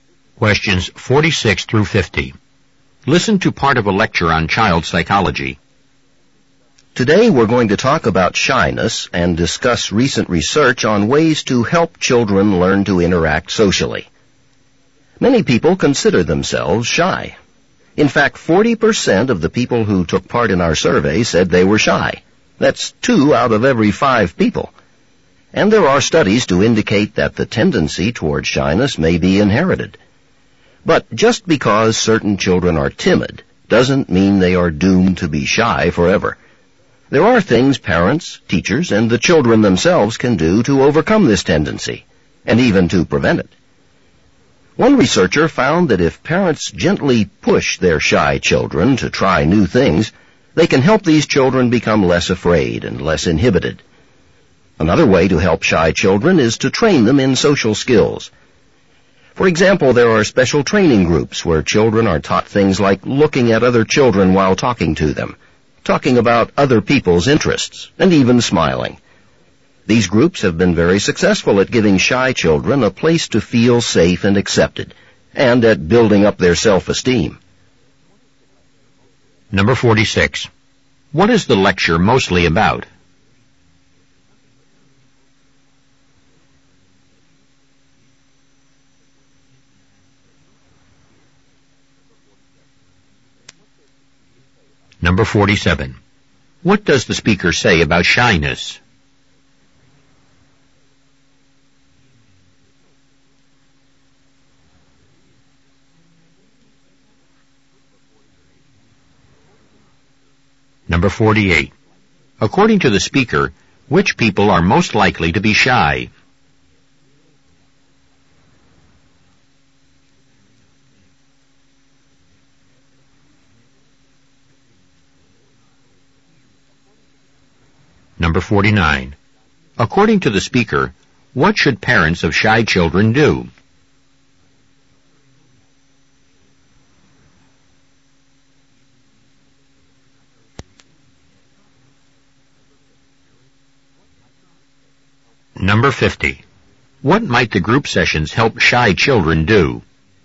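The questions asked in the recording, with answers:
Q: What is the lecture mostly about?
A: Ways to help children overcome shyness

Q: According to the speaker, what should parents of shy children do?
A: Gently push them to try new things

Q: What might the group sessions help shy children do?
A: Learn social skills and build self-esteem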